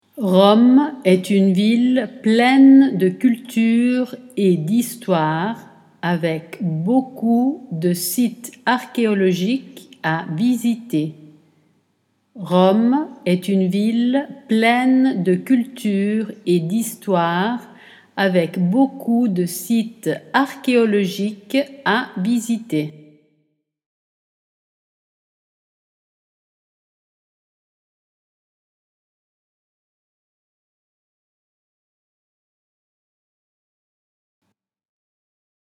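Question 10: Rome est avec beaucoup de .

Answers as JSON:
{"10": "une ville pleine de culture et d'histoire, / sites archéologiques à visiter"}

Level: A2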